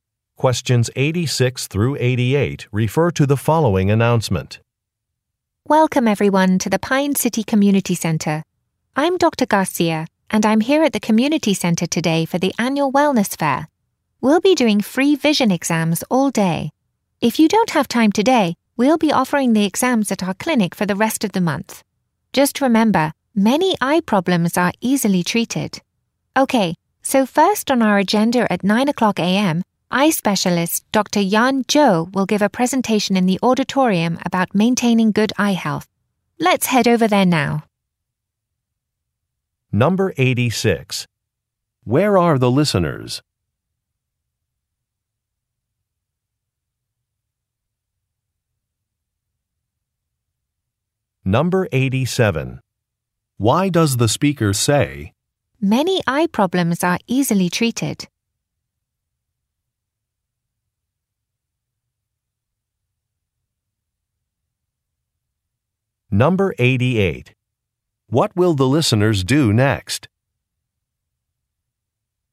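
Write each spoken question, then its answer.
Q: Where are the listeners?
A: At the Pine City Community Center (wellness fair)

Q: What will the listeners do next?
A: Go to the auditorium for a presentation on eye health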